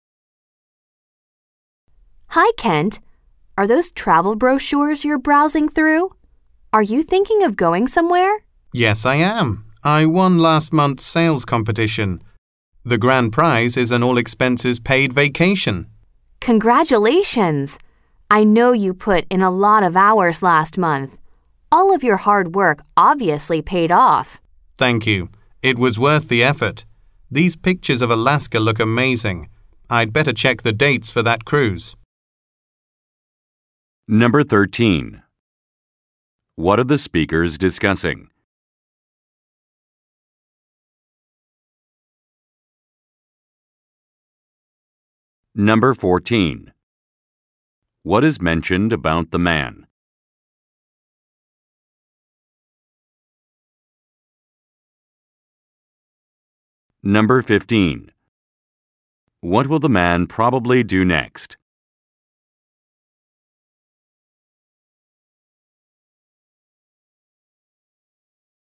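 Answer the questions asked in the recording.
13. The man's prize vacation (travel plans)
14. He won last month's sales competition
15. Check the dates for the Alaska cruise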